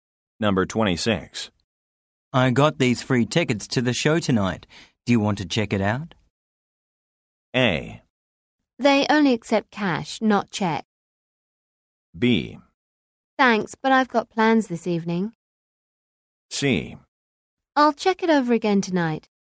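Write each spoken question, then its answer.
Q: Do you want to check it out?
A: B: Thanks, but I've got plans this evening.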